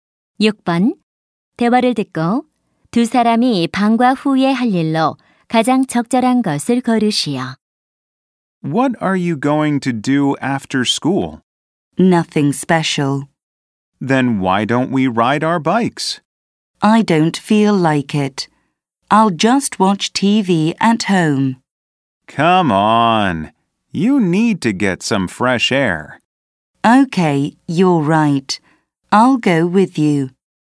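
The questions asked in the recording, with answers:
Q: 대화를 듣고 두 사람이 방과 후에 할 일로 가장 적절한 것을 고르시오.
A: 자전거 타기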